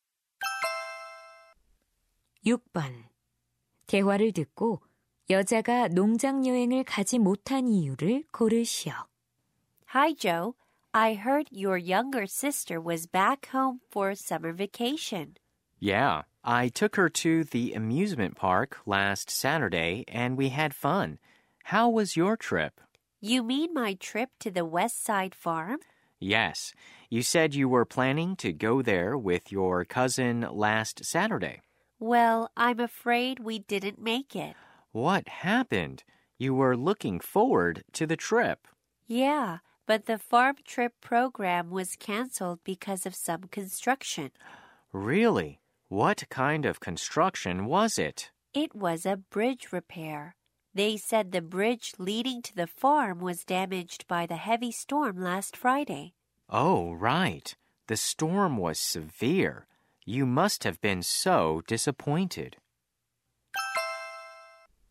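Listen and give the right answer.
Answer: 다리 보수 공사로 농장 여행 프로그램이 취소되어서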